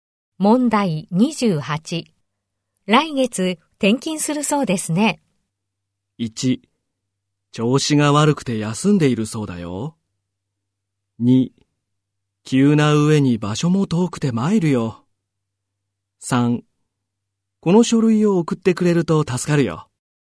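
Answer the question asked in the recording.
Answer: 2: 急な上に場所も遠くて参るよ。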